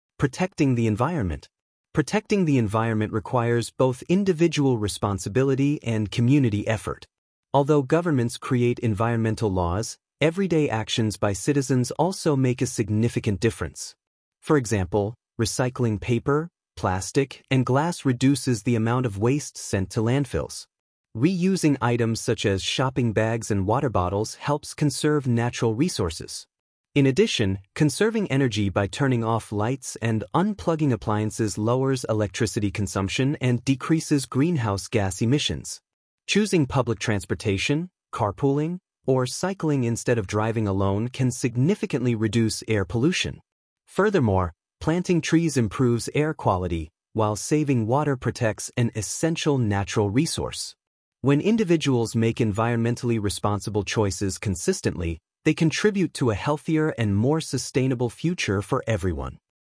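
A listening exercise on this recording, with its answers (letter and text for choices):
II. Choose the correct Answer:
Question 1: What is the main idea of the paragraph?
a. Governments are responsible for protecting the environment.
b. Small daily actions can contribute to environmental protection.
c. Recycling is the only way to protect the planet.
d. Air pollution is the biggest environmental problem.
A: b. Small daily actions can contribute to environmental protection.

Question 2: The word "significant" in paragraph 1 is closest in meaning to:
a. small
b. quick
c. important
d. difficult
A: c. important

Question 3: Why does recycling reduce environmental damage?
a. It increases electricity use.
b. It sends more waste to landfills.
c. It decreases the amount of waste in landfills.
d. It encourages people to buy more products.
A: c. It decreases the amount of waste in landfills.

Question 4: What can we infer about greenhouse gas emissions?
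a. They increase when we conserve energy.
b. They are connected to electricity consumption.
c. They have no effect on the environment.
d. They are only caused by factories.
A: b. They are connected to electricity consumption.

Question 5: Why is reusing items beneficial?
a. It makes products more expensive.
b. It conserves natural resources.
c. It increases pollution.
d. It requires more energy.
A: b. It conserves natural resources.

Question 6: Which option best explains the relationship between individuals and governments?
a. Only governments can protect the environment.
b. Individuals have no responsibility.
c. Both governments and individuals share responsibility.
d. Environmental laws are not necessary.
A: c. Both governments and individuals share responsibility.

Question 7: What is the benefit of planting trees mentioned in the text?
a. They reduce water consumption.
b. They improve air quality.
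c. They produce electricity.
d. They increase traffic.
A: b. They improve air quality.

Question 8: The word "sustainable" most nearly means:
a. temporary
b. long-lasting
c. expensive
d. complicated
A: b. long-lasting

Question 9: Which action directly reduces air pollution?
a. Turning on more lights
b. Driving alone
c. Carpooling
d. Throwing waste in landfills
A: c. Carpooling

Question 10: What is the author's purpose in writing this paragraph?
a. To entertain the reader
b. To criticize government policies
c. To persuade readers to take responsible actions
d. To describe scientific research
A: c. To persuade readers to take responsible actions

I. Answer the following questions: (Use complete sentences)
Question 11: Why is reusing items considered a way to conserve natural resources?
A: Reusing items such as shopping bags and water bottles helps conserve natural resources.

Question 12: What connection can you make between saving electricity and reducing greenhouse gas emissions?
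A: Lowering electricity consumption decreases greenhouse gas emissions.

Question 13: The author includes examples like cycling and carpooling. What do these examples have in common?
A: They are alternatives to driving alone that reduce air pollution.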